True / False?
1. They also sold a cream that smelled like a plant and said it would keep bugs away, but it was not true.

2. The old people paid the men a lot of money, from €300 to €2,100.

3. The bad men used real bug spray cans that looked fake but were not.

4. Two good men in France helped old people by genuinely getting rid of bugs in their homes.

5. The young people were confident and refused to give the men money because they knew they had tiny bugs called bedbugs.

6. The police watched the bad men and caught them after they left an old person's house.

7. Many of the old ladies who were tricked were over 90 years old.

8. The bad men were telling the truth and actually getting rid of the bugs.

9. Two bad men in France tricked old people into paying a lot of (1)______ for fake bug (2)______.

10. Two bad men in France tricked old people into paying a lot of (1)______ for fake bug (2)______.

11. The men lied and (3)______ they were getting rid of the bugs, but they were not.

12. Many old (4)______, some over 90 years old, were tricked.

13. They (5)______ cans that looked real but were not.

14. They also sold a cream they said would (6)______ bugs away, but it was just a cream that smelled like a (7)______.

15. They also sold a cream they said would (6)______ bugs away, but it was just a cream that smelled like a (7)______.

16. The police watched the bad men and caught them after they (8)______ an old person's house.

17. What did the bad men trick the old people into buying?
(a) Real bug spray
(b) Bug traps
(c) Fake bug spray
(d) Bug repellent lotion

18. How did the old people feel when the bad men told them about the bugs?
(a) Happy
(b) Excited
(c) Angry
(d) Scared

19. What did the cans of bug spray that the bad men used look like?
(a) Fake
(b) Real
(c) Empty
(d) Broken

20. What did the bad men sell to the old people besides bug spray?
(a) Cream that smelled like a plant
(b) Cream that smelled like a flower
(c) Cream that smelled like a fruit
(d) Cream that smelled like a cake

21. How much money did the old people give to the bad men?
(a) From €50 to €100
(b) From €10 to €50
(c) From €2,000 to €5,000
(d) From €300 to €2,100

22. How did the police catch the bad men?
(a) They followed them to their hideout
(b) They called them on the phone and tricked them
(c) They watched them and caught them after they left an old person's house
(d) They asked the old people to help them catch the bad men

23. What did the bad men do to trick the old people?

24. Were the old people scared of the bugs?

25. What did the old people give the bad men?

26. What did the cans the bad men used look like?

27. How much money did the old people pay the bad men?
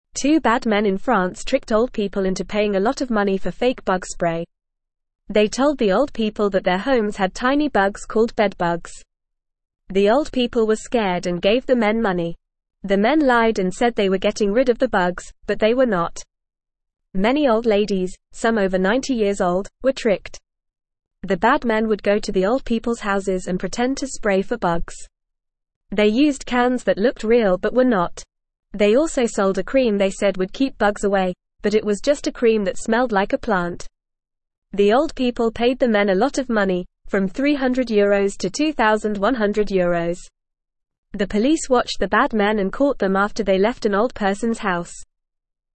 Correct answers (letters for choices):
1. True
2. True
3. False
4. False
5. False
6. True
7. True
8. False
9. money
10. spray
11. said
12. ladies
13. used
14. keep
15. plant
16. left
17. c
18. d
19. b
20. a
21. d
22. c
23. The bad men tricked the old people by pretending there were bugs in their homes and selling them fake bug spray and cream.
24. Yes, the old people were scared of the bugs because they thought they were real.
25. The old people gave the bad men a lot of money.
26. The cans the bad men used looked real, but they were actually fake.
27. The old people paid the bad men from €300 to €2,100.

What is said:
Two bad men in France tricked old people into paying a lot of money for fake bug spray. They told the old people that their homes had tiny bugs called bedbugs. The old people were scared and gave the men money. The men lied and said they were getting rid of the bugs, but they were not. Many old ladies, some over 90 years old, were tricked.
The bad men would go to the old people's houses and pretend to spray for bugs. They used cans that looked real but were not. They also sold a cream they said would keep bugs away, but it was just a cream that smelled like a plant.

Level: Level 1